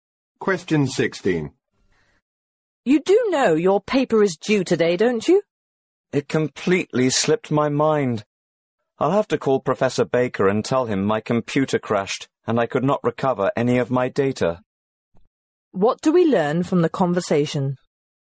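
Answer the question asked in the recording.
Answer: The woman forgot the paper and will make an excuse to the professor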